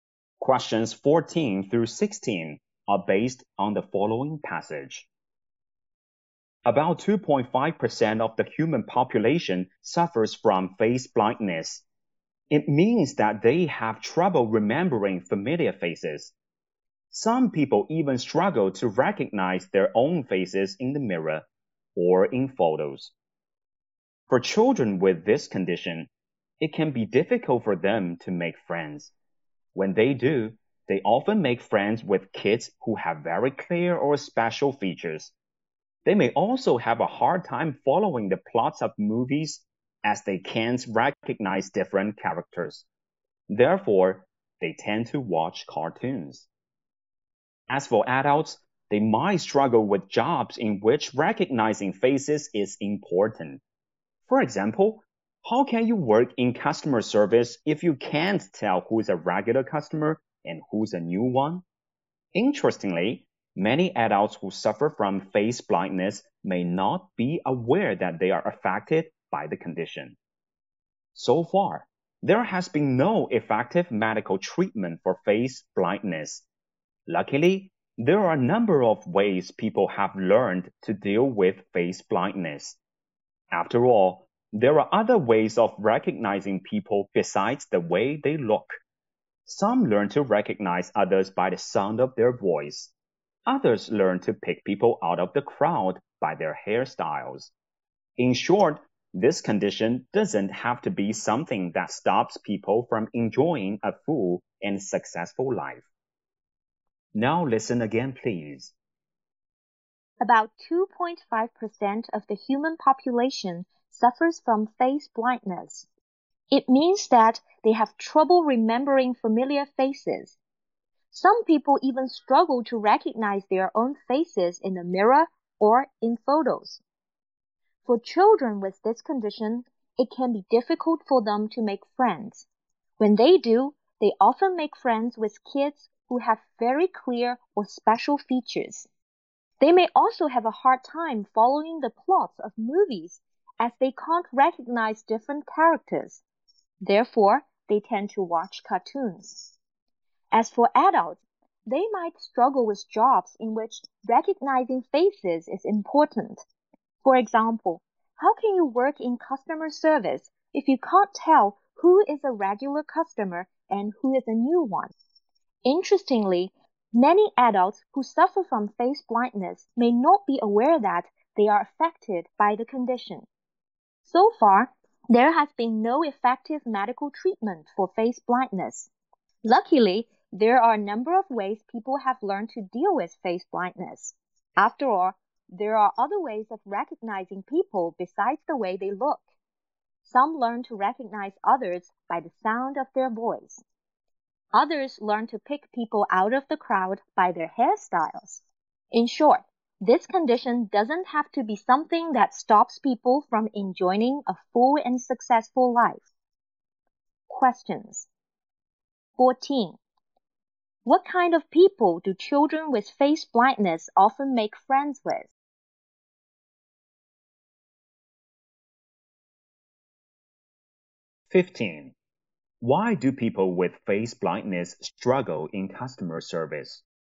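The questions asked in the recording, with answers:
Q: What kind of people do children with face blindness often make friends with?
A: Kids with very clear or special features

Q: Why do people with face blindness struggle in customer service?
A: They can't tell regular customers from new ones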